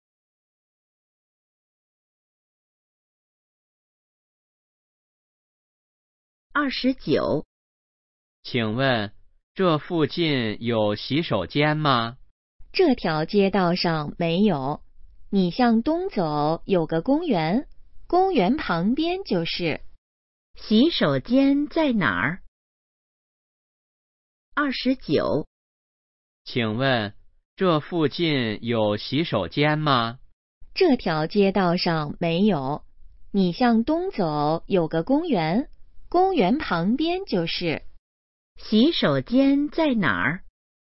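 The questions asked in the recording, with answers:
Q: 洗手间在哪儿?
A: 公园旁边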